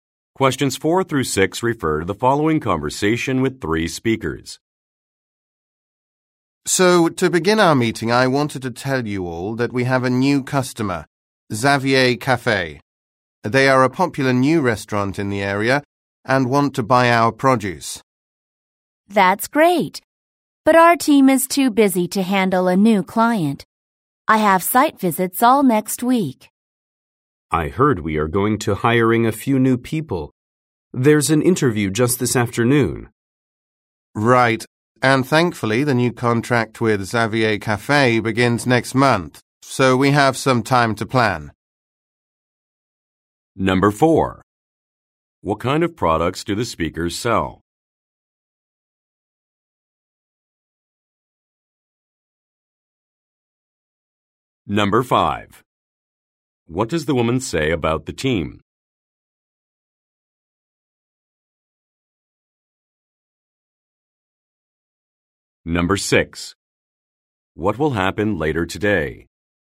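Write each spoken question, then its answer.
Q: What kind of products do the speakers sell?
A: Produce

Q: What will happen later today?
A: A job interview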